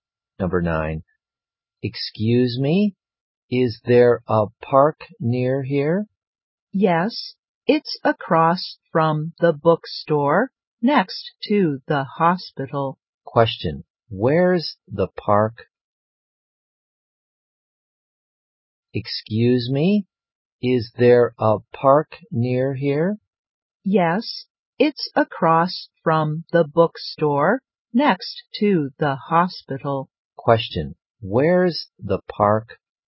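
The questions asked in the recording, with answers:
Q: Question, where's the park?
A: Across from the bookstore, next to the hospital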